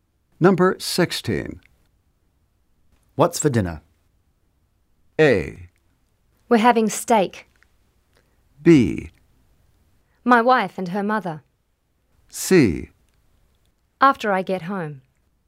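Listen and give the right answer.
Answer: A: We're having steak.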